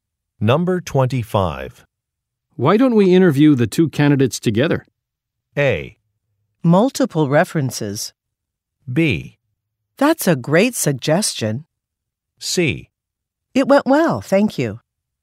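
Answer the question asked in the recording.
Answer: B: That's a great suggestion.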